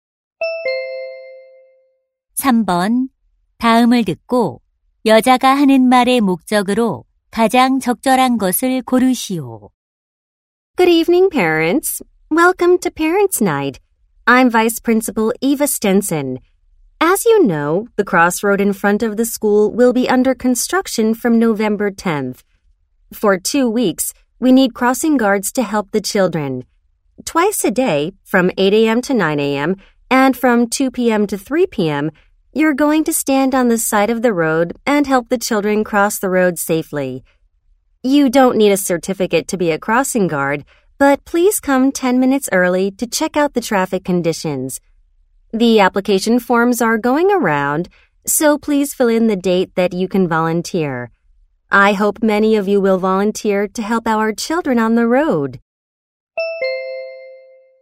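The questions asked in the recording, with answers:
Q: 다음을 듣고 여자가 하는 말의 목적으로 가장 적절한 것을 고르시오.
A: 학교 앞 교통 지도 자원봉사자(crossing guard)를 모집하려고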